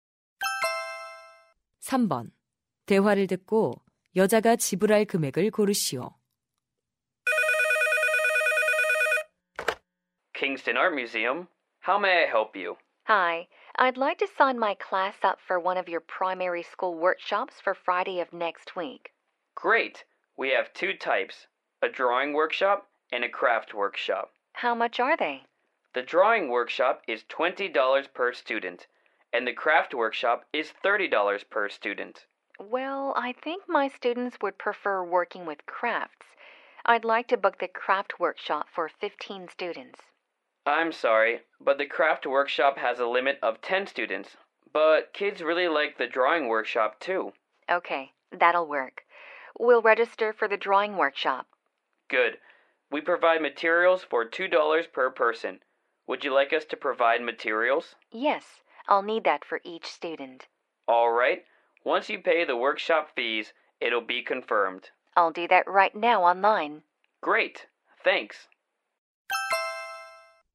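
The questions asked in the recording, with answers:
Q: 대화를 듣고 여자가 지불할 금액을 고르시오.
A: $330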